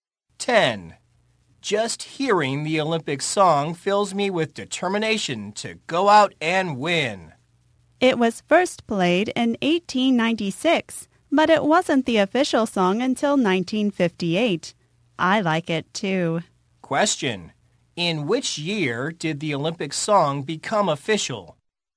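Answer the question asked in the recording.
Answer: 1958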